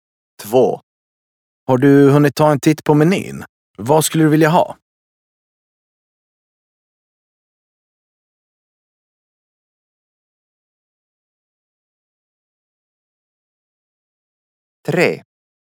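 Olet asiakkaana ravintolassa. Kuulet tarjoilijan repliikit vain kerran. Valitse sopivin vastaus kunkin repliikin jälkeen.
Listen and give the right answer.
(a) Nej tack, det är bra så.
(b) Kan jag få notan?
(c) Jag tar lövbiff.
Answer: (c) Jag tar lövbiff.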